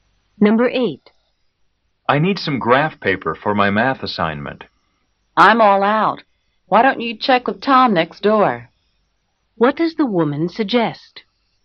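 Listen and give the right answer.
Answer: Asking Tom next door for graph paper.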